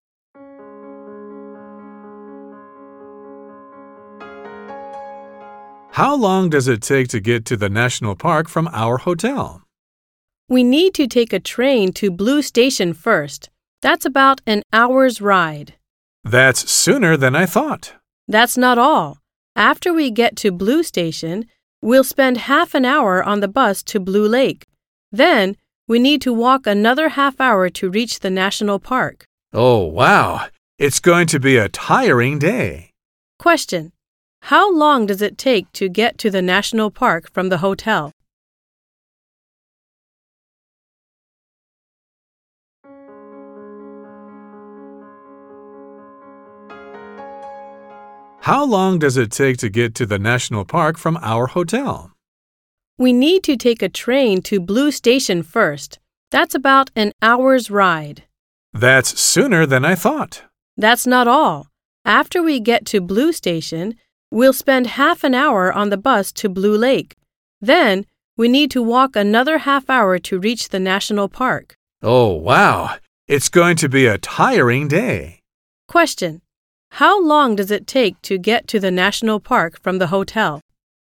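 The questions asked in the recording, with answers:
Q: How long does it take to get to the national park from the hotel?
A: Two hours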